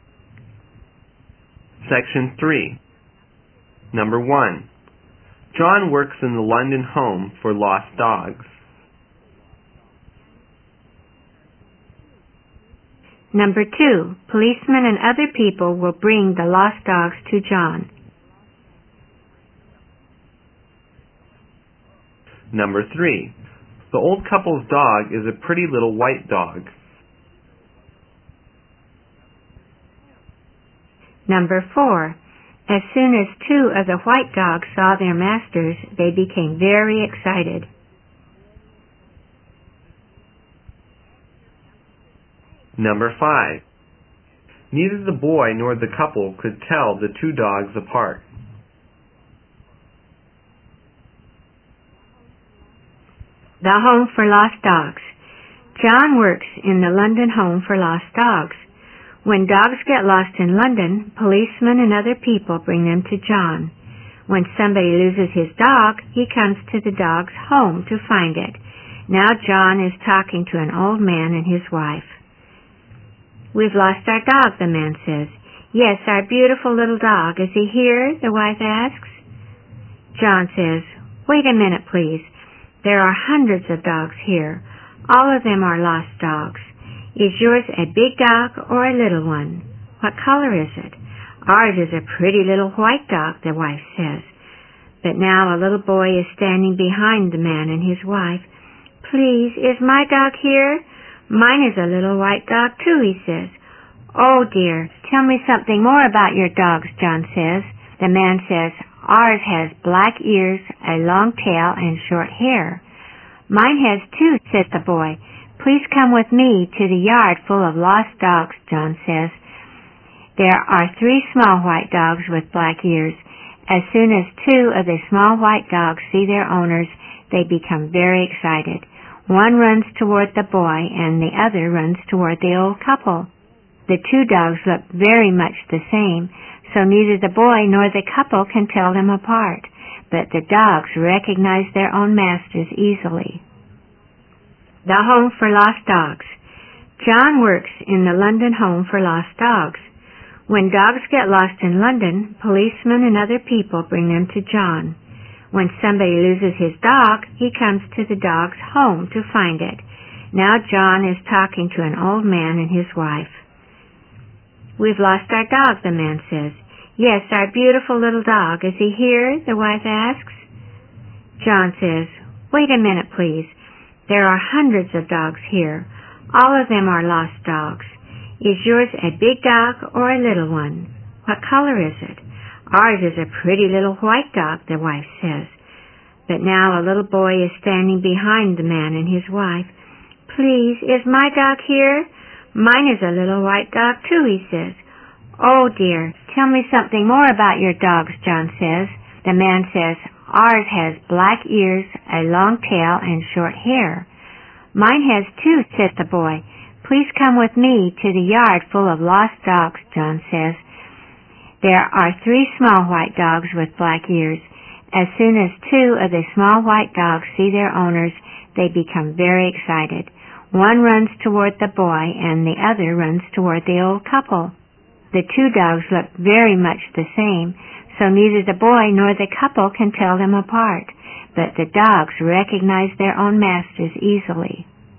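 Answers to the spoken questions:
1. True
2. True
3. True
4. True
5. True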